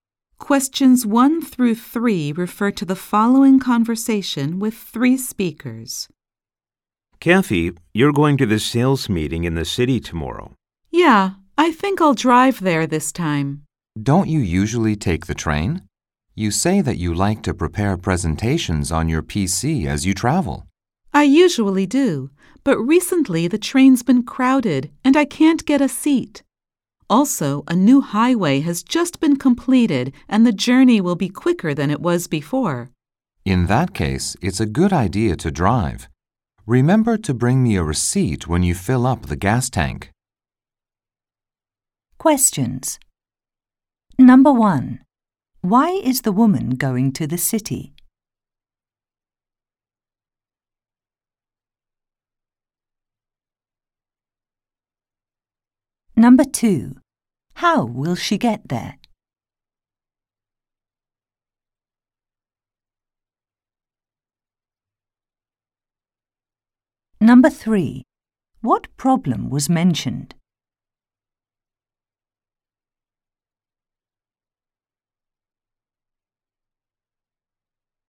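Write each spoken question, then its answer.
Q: Why is the woman going to the city?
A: To attend a sales meeting

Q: How will she get there?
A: She will drive

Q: What problem was mentioned?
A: The train has been crowded and she can't get a seat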